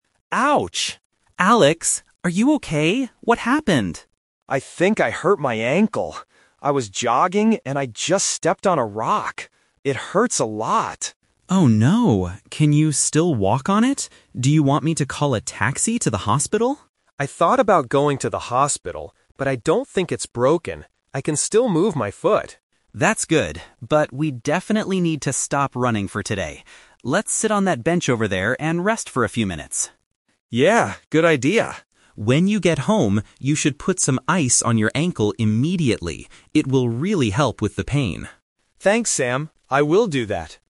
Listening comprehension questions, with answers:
Listen to the conversation between two friends. Choose the correct answer (A, B, or C) for each question.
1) How did Alex hurt his ankle?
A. He was playing a football match.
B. He fell off a bench in the park.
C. He stepped on a rock while jogging.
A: He stepped on a rock while jogging.

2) What do the two friends decide to do right now?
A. Go straight to the hospital.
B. Sit on a bench and rest.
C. Keep jogging slowly.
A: Sit on a bench and rest.

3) What does Sam advise Alex to do later?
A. Put some ice on his ankle.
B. Take some pain medicine.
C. Call a doctor from home.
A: Put some ice on his ankle.

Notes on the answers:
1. Alex clearly says, "I was jogging, and I just stepped on a rock." Trap A is wrong: Football is a sport, which is plausible, but it is not mentioned in the audio. Trap B is wrong: A "bench" is mentioned later when they decide to sit down, not how he got injured.
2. Sam suggests, "Let's sit on that bench over there and rest," and Alex agrees ("Yeah, good idea."). Trap A is wrong (The Twist): Sam asks if he wants a taxi to the hospital, and Alex says "I thought about going... but I don't think it's broken." They decide not to go. Trap C is wrong: Sam says "we definitely need to stop running for today," so they are not going to keep jogging.
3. Sam gives him advice for later: "When you get home, you should put some ice on your ankle immediately." Trap B is wrong: Medicine is a logical thing for pain, but it is never mentioned in the conversation. Trap C is wrong: Sam offered the hospital earlier, but his advice for when Alex gets home is to use ice, not to call a doctor.

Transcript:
Alex: Ouch!
Sam: Alex! Are you okay? What happened?
Alex: I think I hurt my ankle. I was jogging, and I just stepped on a rock. It hurts a lot.
Sam: Oh no. Can you still walk on it? Do you want me to call a taxi to the hospital?
Alex: I thought about going to the hospital, but I don't think it's broken. I can still move my foot.
Sam: That's good. But we definitely need to stop running for today. Let's sit on that bench over there and rest for a few minutes.
Alex: Yeah, good idea.
Sam: When you get home, you should put some ice on your ankle immediately. It will really help with the pain.

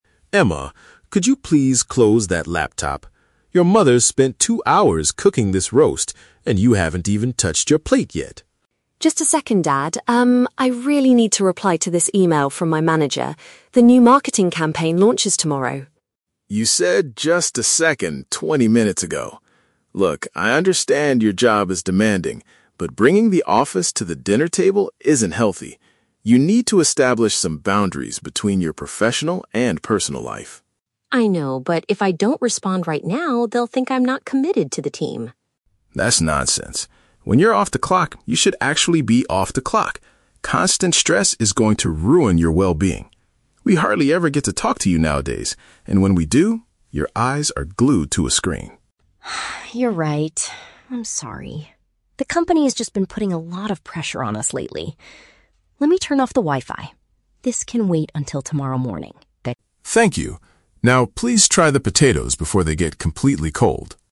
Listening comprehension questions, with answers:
Listen to the conversation between a father and his adult daughter during a family dinner, and choose the correct answer (A, B, or C).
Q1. Why is the father annoyed at the beginning of the conversation?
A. Emma is eating her food too slowly.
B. Emma is ignoring her meal to focus on office tasks.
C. Emma brought her manager to the family dinner uninvited.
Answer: Emma is ignoring her meal to focus on office tasks.

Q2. What is Emma's main fear if she stops working?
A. Her colleagues will think she lacks dedication to her job.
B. She will be fired from the company immediately.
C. The new marketing campaign will be canceled tomorrow.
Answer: Her colleagues will think she lacks dedication to her job.

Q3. How does the conversation end?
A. Emma tells her father to wait twenty minutes for her to finish.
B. Emma decides to leave the table and work in her bedroom.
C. Emma agrees to disconnect from work until the next day.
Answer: Emma agrees to disconnect from work until the next day.

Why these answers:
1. The father complains that Emma hasn't "touched her plate" because she is typing on her laptop and replying to a "manager." This means she is prioritizing work over eating.
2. Emma says, "they'll think I'm not committed to the team." The phrase "lacks dedication" is a paraphrase of "not committed."
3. At the end, Emma apologizes, says "Let me turn off the Wi-Fi," and decides her work "can wait until tomorrow morning."

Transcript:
Dad: Emma, could you please close that laptop? Your mother spent two hours cooking this roast, and you haven't even touched your plate yet.
Emma: Just a second, Dad... um, I really need to reply to this email from my manager. The new marketing campaign launches tomorrow.
Dad: You said "just a second" twenty minutes ago. Look, I understand your job is demanding, but bringing the office to the dinner table isn't healthy. You need to establish some boundaries between your professional and personal life.
Emma: I know, but if I don't respond right now, they'll think I'm not committed to the team.
Dad: That's nonsense. When you're off the clock, you should actually be off the clock. Constant stress is going to ruin your well-being. We hardly ever get to talk to you nowadays, and when we do, your eyes are glued to a screen.
Emma: Ah, you're right. I'm sorry. The company has just been putting a lot of pressure on us lately. Let me turn off the Wi-Fi. This can wait until tomorrow morning.

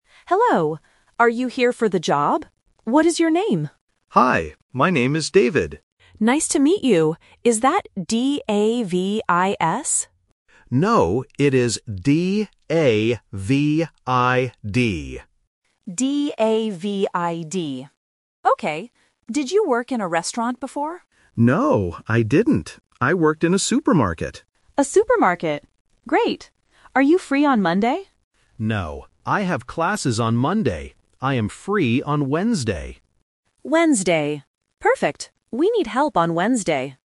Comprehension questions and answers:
Listen to the conversation between a cafe owner and an applicant. Circle the correct answer for each question.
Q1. How does the man spell his name?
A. D-A-V-I-S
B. D-A-V-I-D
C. D-A-V-E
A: D-A-V-I-D

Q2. Where did the man work before?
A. In a restaurant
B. In a supermarket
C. In a hotel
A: In a supermarket

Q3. What day is the man free to work?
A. Monday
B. Tuesday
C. Wednesday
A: Wednesday

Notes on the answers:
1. David spells his name clearly as "D-A-V-I-D". Option (A) D-A-V-I-S is the trap because the owner guesses this spelling first, but David corrects him. Option (C) D-A-V-E is a plausible name but is never mentioned.
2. David states, "I worked in a supermarket." Option (A) In a restaurant is the trap because the owner asks about it, but David says "No". Option (C) In a hotel is not mentioned.
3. David says, "I am free on Wednesday." Option (A) Monday is the trap because the owner asks if he is free on Monday, but David says he has classes. Option (B) Tuesday is not mentioned.

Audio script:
Owner: Hello. Are you here for the job? What is your name?
David: Hi. My name is David.
Owner: Nice to meet you. Is that D-A-V-I-S?
David: No, it is D-A-V-I-D.
Owner: D-A-V-I-D. Okay. Did you work in a restaurant before?
David: No, I didn't. I worked in a supermarket.
Owner: A supermarket. Great. Are you free on Monday?
David: No, I have classes on Monday. I am free on Wednesday.

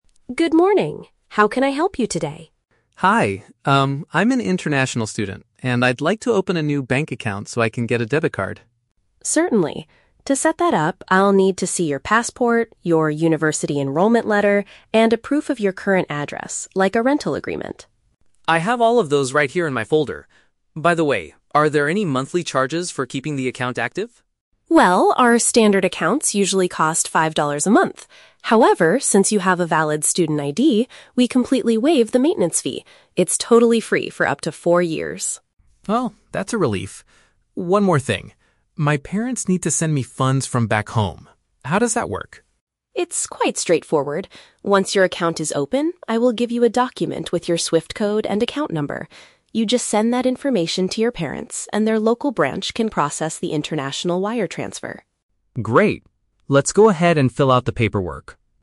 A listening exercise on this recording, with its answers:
Listen to the conversation between an international student and a bank clerk. Read the questions below and choose the correct answer (A, B, or C) for each.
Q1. What documents must the student provide to set up his new account?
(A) His passport, a university letter, and his parents' financial records.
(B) Official identification, proof of studying, and a housing contract.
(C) His passport, a student card, and five dollars for the initial deposit.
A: Official identification, proof of studying, and a housing contract.

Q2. What is the bank's policy regarding the monthly account fee for this student?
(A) He is required to pay a standard charge of five dollars.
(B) He will receive a small discount on the regular monthly charges.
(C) He will not have to pay any maintenance costs for the account.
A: He will not have to pay any maintenance costs for the account.

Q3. How will the student's family transfer funds to him from his home country?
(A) The bank will send an official request directly to his parents' local branch.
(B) He will provide specific banking details to his parents for the transaction.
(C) His parents will mail him a special document with a SWIFT code.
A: He will provide specific banking details to his parents for the transaction.

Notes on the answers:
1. The clerk asks for a "passport" (official identification), a "university enrollment letter" (proof of studying), and a "rental agreement" (housing contract). The Trap: Option (A) is incorrect because the clerk does not ask for his parents' financial records. Option (C) mentions "five dollars", but that is discussed later as a standard fee, not a deposit. Not mentioned: A student card is mentioned later to waive fees, but it wasn't in the initial list of required documents.
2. The clerk says they "completely waive the maintenance fee" and it is "totally free for up to four years" because he is a student. The Trap: Option (A) is incorrect. The "five dollars" charge applies to "standard accounts", but his fee is waived. Option (B) is incorrect because it is completely free, not just a "small discount".
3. The clerk tells the student to "send that information" (SWIFT code and account number = specific banking details) to his parents so they can process the "wire transfer" (transaction). The Trap: Option (A) is incorrect. The bank does not send anything to the parents' branch; the student must send the information. Option (C) is the opposite of the truth. The bank gives the SWIFT code to the student, not the parents.

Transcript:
Bank Clerk: Good morning. How can I help you today?
Student: Hi. Um, I'm an international student and I'd like to open a new bank account so I can get a debit card.
Bank Clerk: Certainly. To set that up, I'll need to see your passport, your university enrollment letter, and a proof of your current address, like a rental agreement.
Student: I have all of those right here in my folder. By the way, are there any monthly charges for keeping the account active?
Bank Clerk: Well, our standard accounts usually cost five dollars a month. However, since you have a valid student ID, we completely waive the maintenance fee. It's totally free for up to four years.
Student: Oh, that's a relief! One more thing. My parents need to send me funds from back home. How does that work?
Bank Clerk: It's quite straightforward. Once your account is open, I will give you a document with your SWIFT code and account number. You just send that information to your parents, and their local branch can process the international wire transfer.
Student: Great. Let's go ahead and fill out the paperwork.

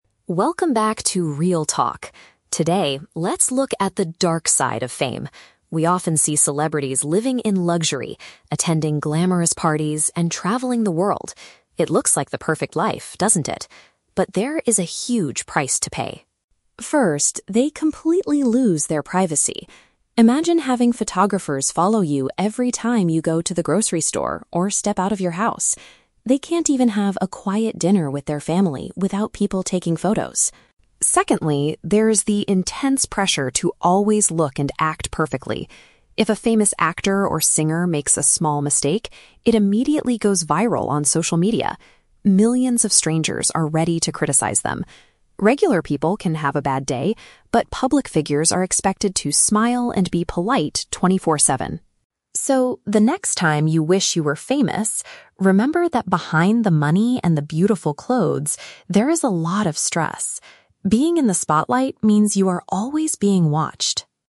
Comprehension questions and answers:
Listen to a podcast episode about celebrities. Choose the correct answer (A, B, or C) for each question.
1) What is a major problem for celebrities mentioned in the podcast?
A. They have to pay a lot of money to attend glamorous parties.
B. They cannot do everyday activities without being watched by others.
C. They struggle to find enough time to travel with their families.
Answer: They cannot do everyday activities without being watched by others.

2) How is a celebrity's bad day different from a regular person's?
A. Celebrities are expected to maintain a positive attitude all the time.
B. Celebrities usually lose their jobs if they make a small mistake.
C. Celebrities are forced to apologize to millions of strangers on television.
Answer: Celebrities are expected to maintain a positive attitude all the time.

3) What is the host's main message to the listeners?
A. People should stop reading entertainment news and social media.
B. Regular people should work harder to achieve a luxurious lifestyle.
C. Fame comes with significant mental and emotional challenges.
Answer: Fame comes with significant mental and emotional challenges.

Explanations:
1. The host says photographers follow them "every time you go to the grocery store" (which paraphrases to doing everyday activities without being watched). Why the traps are wrong: (A) is a trap. The phrase "price to pay" is used right after mentioning "parties," but it means a metaphorical consequence, not literally paying money for parties. (C) is a plausible problem, but the audio only mentions having a "quiet dinner with their family," not struggling to find time to travel with them.
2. The host states that "public figures are expected to smile and be polite 24/7" (which paraphrases to maintaining a positive attitude all the time). Why the traps are wrong: (B) is a trap. The host says if they make a "small mistake," they are criticized, not that they lose their jobs. (C) is a plausible action for a celebrity, but the audio never mentions being forced to apologize on TV.
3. At the end, the host warns that "behind the money... there is a lot of stress" and being famous means being constantly watched (which means fame comes with significant mental and emotional challenges). Why the traps are wrong: (A) is a plausible piece of advice, but the host never tells the audience to stop reading the news or social media. (B) is a trap. The host mentions "luxury" and "money" but warns the listeners about wishing for fame, rather than encouraging them to seek it.

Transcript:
Podcast Host: "Welcome back to 'Real Talk'. Today, let's look at the dark side of fame. We often see celebrities living in luxury, attending glamorous parties, and traveling the world. It looks like the perfect life, doesn't it? But there is a huge price to pay.
First, they completely lose their privacy. Imagine having photographers follow you every time you go to the grocery store or step out of your house. They can't even have a quiet dinner with their family without people taking photos.
Secondly, there is the intense pressure to always look and act perfectly. If a famous actor or singer makes a small mistake, it immediately goes viral on social media. Millions of strangers are ready to criticize them. Regular people can have a bad day, but public figures are expected to smile and be polite 24/7.
So, the next time you wish you were famous, remember that behind the money and the beautiful clothes, there is a lot of stress. Being in the spotlight means you are always being watched."

